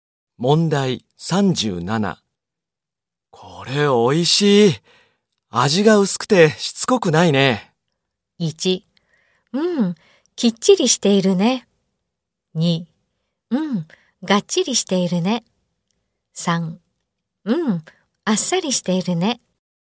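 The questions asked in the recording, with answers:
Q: これ美味しい。味が薄くてしつこくないね。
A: 3: うん、あっさりしているね。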